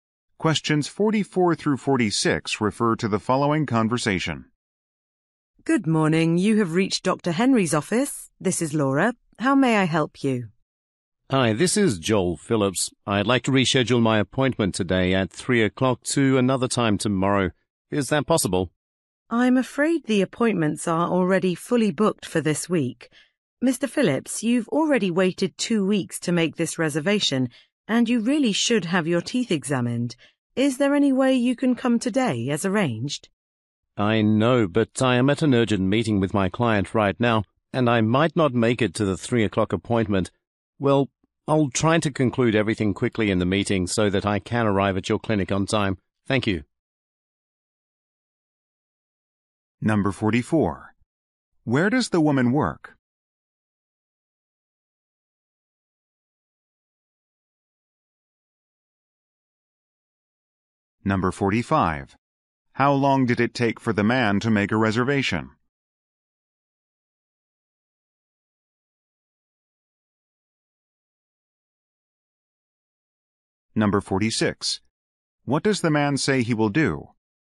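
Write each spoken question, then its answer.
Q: Where does the woman work?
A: At a dentist's office

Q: How long did it take for the man to make a reservation?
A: 2 weeks

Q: What does the man say he will do?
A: Finish his meeting quickly and come on time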